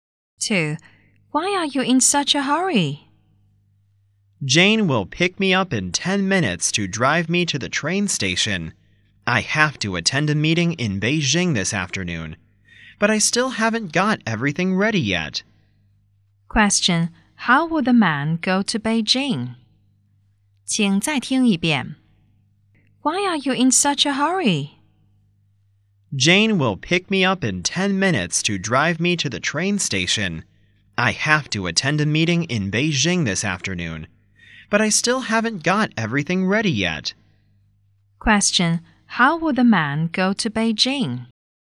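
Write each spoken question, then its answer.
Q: Question, how will the man go to Beijing?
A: By train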